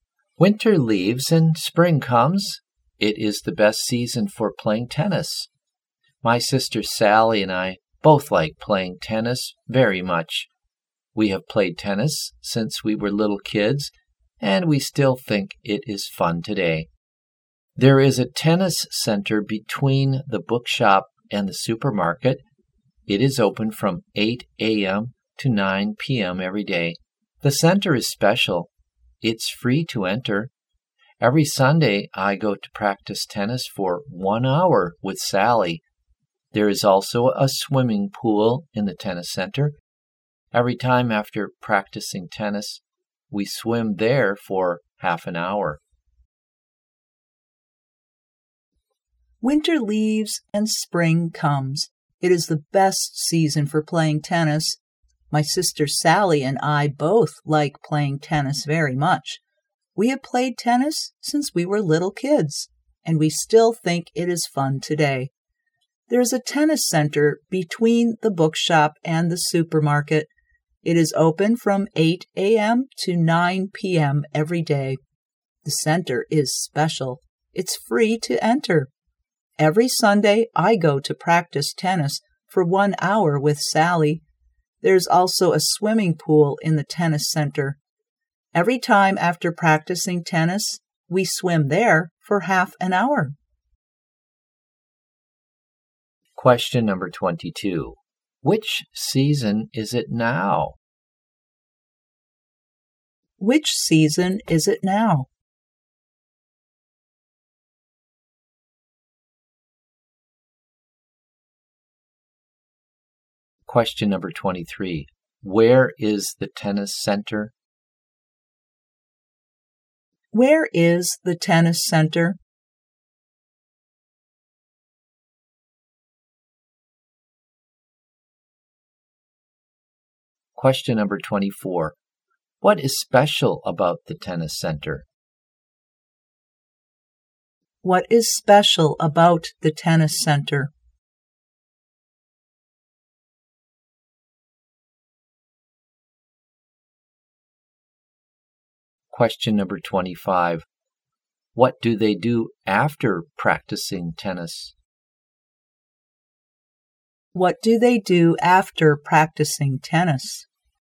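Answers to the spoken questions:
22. Spring
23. Between the bookshop and the supermarket
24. It's free to enter
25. They swim for half an hour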